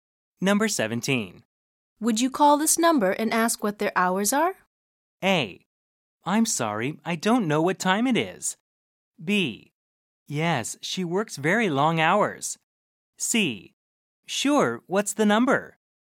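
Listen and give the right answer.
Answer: C: Sure, what's the number?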